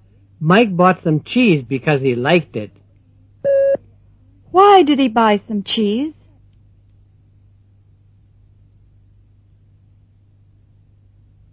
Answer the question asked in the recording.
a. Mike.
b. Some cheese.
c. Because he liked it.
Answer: c. Because he liked it.

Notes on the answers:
Mike bought some cheese because he liked it. Why did he buy some cheese?

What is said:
9.Mike bought some cheese because he liked it. Why did he buy some cheese? (c)